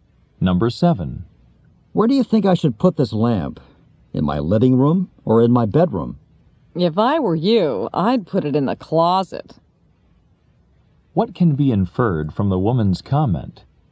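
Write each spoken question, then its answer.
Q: What can be inferred from the woman's comment?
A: She doesn't like the lamp.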